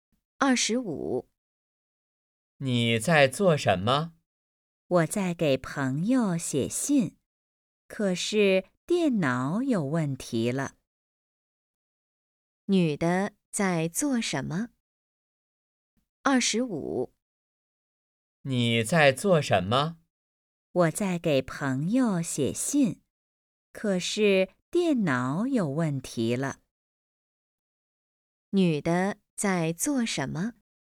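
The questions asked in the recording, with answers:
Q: 女的在做什么?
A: 给朋友写信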